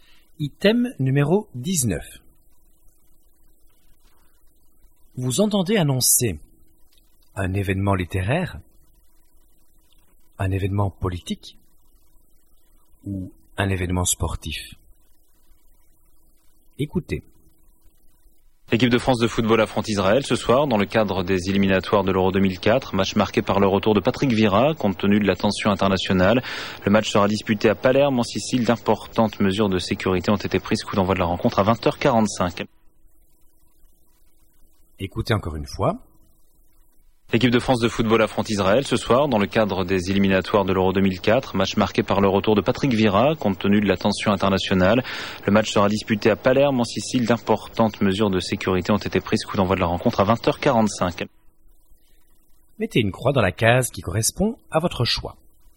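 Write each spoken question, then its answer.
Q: Vous entendez annoncer un événement littéraire, un événement politique ou un événement sportif.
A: un événement sportif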